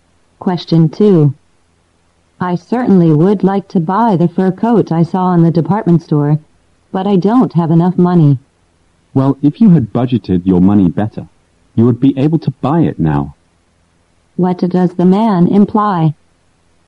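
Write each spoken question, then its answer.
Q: What does the man imply?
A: She didn't budget her money well, so she can't afford the coat.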